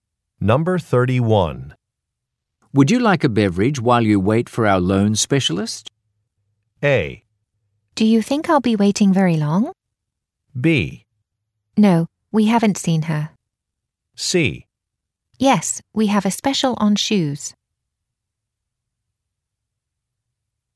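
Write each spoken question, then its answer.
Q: Would you like a beverage while you wait for our loan specialist?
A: A: Do you think I'll be waiting very long?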